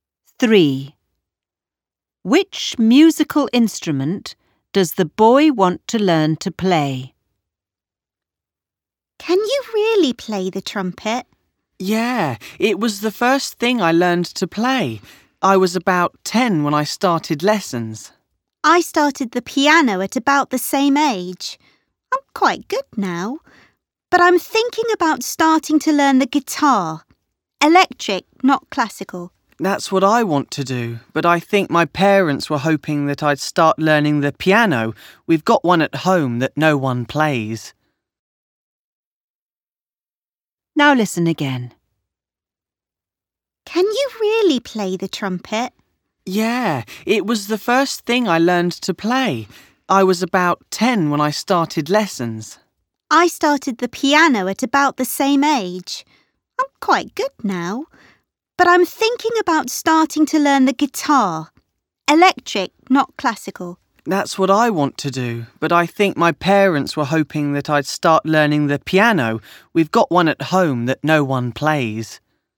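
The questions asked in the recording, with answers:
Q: Which musical instrument does the boy want to learn to play?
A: Electric guitar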